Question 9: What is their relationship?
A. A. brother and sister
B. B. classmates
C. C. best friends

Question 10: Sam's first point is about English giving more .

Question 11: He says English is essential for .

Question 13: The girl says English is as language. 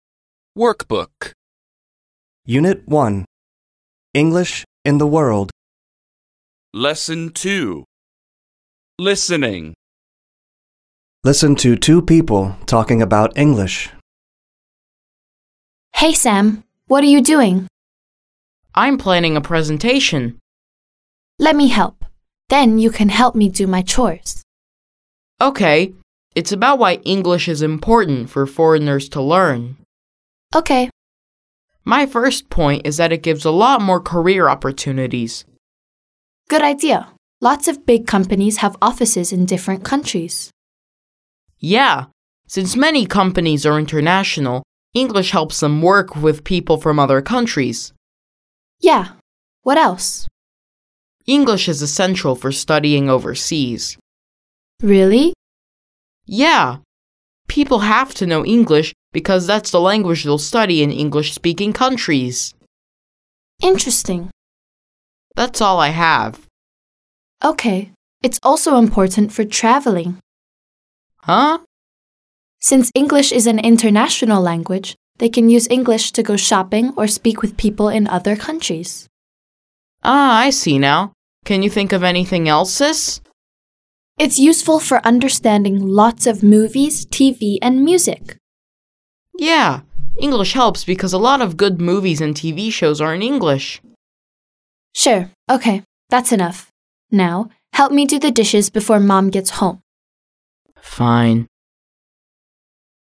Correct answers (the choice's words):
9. A. brother and sister
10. career opportunities
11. studying overseas
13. international

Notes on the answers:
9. Mối quan hệ của họ là gì? A. brother and sister: anh chị em B. classmates: bạn cùng lớp C. best friends: bạn thân Chúng ta có thể đoán dựa vào câu: Let me help then you can help me do my chores. Tạm dịch: Hãy để chị giúp sau đó em có thể giúp chij làm việc nhà.
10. career opportunities: cơ hội nghề nghiệp => Sam's first point is about English giving more career opportunities. Thông tin: Sam: My first point is that it gives a lot more career opportunities. Tạm dịch: Sam: Quan điểm đầu tiên của em là nó mang lại nhiều cơ hội nghề nghiệp hơn.
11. studying overseas: học ở nước ngoài/ du học => He says English is essential for studying overseas. Thông tin: Sam: English is essential for studying overseas. Tạm dịch: Sam: Tiếng Anh rất cần thiết cho việc du học.
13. international (adj): quốc tế => The girl says English is as international language. Thông tin: Sister: Since English is an international language, ... Tạm dịch: Vì tiếng Anh là ngôn ngữ quốc tế, ...